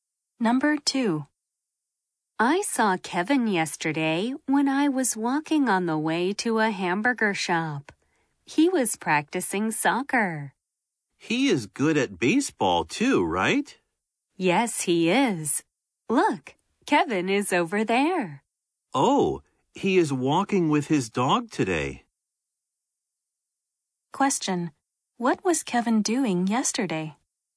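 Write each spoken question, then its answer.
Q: What was Kevin doing yesterday?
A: He was practicing soccer.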